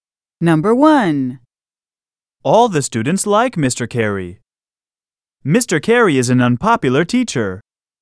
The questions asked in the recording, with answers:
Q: All the students like Mr. Carey. Mr. Carey is an unpopular teacher.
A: Different is the correct answer.